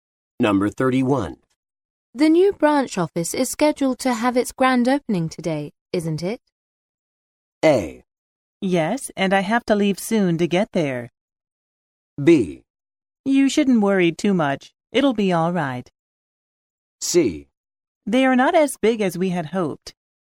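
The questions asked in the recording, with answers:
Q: The new branch office is scheduled to have its grand opening today, isn't it?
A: A: Yes, and I have to leave soon to get there.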